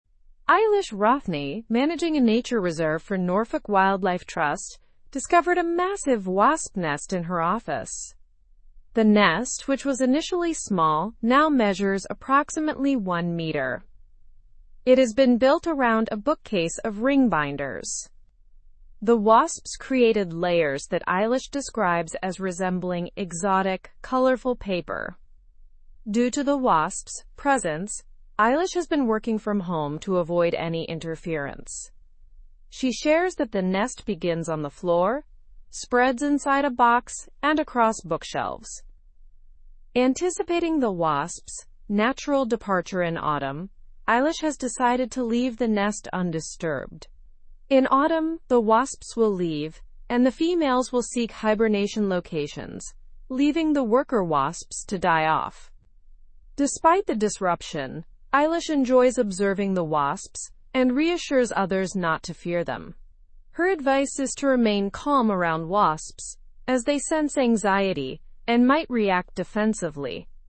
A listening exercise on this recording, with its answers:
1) Who found the wasp nest in her office?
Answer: Eilish Rothney found the wasp nest in her office.

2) How large is the wasp nest described in the article?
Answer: The wasp nest is approximately one meter in size.

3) Where was the wasp nest located in the office?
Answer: The wasp nest was built around a bookcase of ring binders.

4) Why is Eilish working from home?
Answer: Eilish is working from home to avoid interference from the wasps.

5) What is expected to happen to the wasps in autumn?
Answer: In autumn, the wasps will leave, and the females will seek hibernation locations.

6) How does Eilish advise people to behave around wasps?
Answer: Eilish advises people to remain calm around wasps.

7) What is Eilish's overall attitude towards the wasps?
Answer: Eilish enjoys observing the wasps and reassures others not to fear them.

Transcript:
Eilish Rothney, managing a nature reserve for Norfolk Wildlife Trust, discovered a massive wasp nest in her office. The nest, which was initially small, now measures approximately one meter. It has been built around a bookcase of ring binders.
The wasps created layers that Eilish describes as resembling exotic, colorful paper. Due to the wasps' presence, Eilish has been working from home to avoid any interference. She shares that the nest begins on the floor, spreads inside a box, and across bookshelves.
Anticipating the wasps' natural departure in autumn, Eilish has decided to leave the nest undisturbed. In autumn, the wasps will leave, and the females will seek hibernation locations, leaving the worker wasps to die off.
Despite the disruption, Eilish enjoys observing the wasps and reassures others not to fear them. Her advice is to remain calm around wasps as they sense anxiety and might react defensively.

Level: Level 3